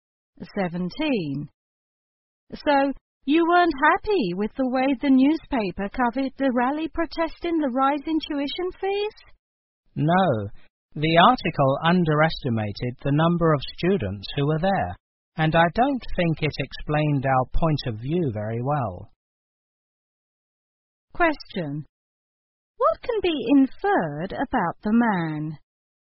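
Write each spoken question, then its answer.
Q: What can be inferred about the man?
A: He took part in the rally against the tuition increase.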